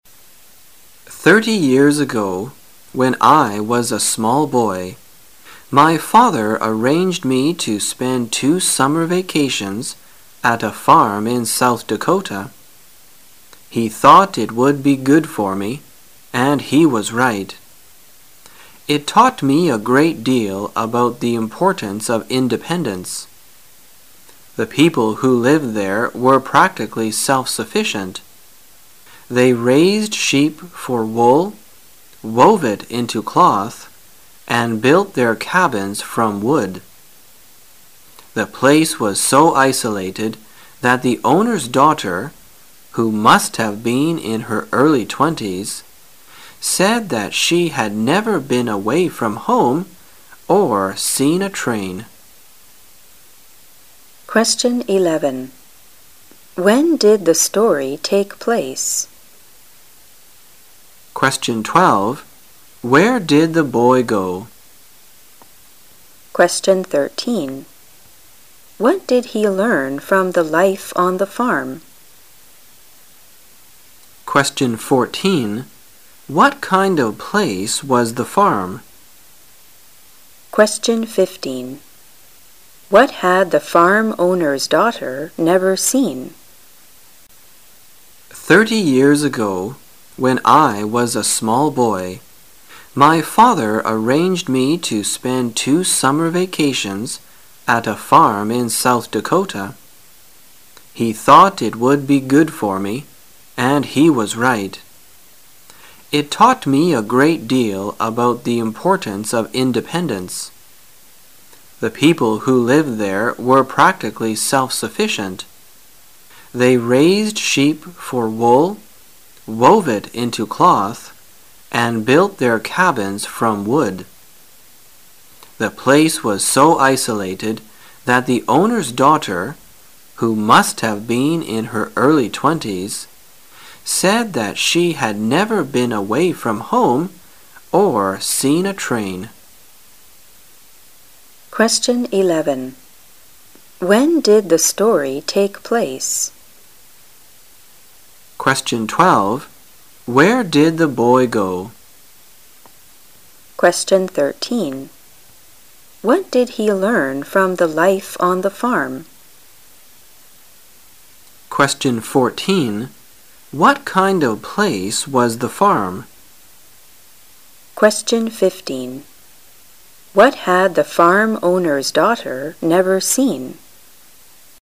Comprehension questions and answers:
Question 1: Where did the boy go? The boy went to ______ in South Dakota.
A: a farm

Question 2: What did he learn from the life on the farm? He learned a great deal about the importance of ______.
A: independence

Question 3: What kind of place was the farm? The place was so ______.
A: isolated

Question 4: What had the farm owner's daughter never seen? She had never seen ______.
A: a train

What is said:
[解析] 11-15 Thirty years ago, when I was a small boy, my father arranged me to spend two summer vacations at a farm in South Dakota. He thought it would be good for me, and he was right. It taught me a great deal about the importance of independence. The people who lived there were practically self-sufficient. They raised sheep for wool, wove it into cloth, and built their cabins from wood. The place was so isolated that the owner's daughter, who must have been in her early twenties, said that she had never been away from home or seen a train. Q: When did the story take place?